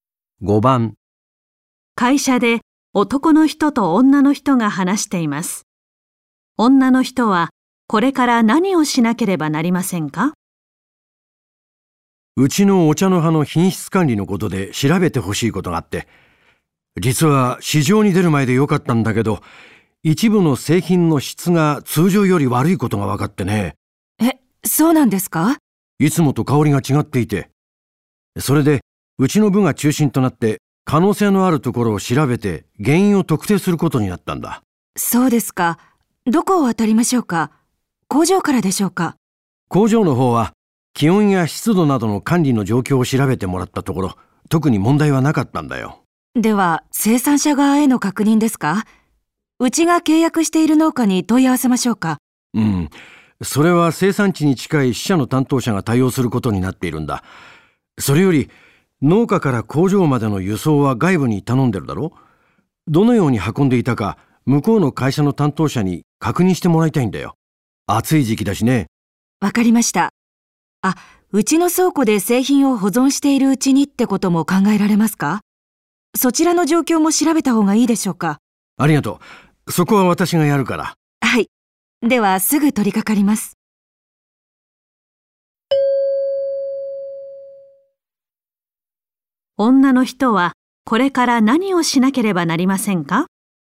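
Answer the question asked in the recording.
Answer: 輸送を頼んでいる外部の会社に、どのように運んでいたか確認する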